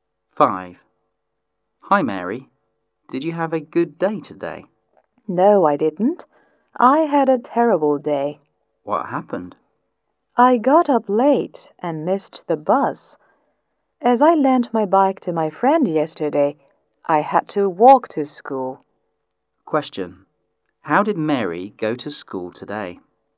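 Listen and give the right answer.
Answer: On foot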